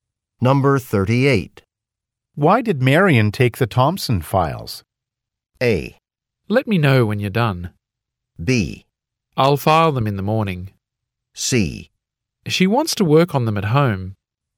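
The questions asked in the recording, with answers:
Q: Why did Marion take the Thompson files?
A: C: She wants to work on them at home.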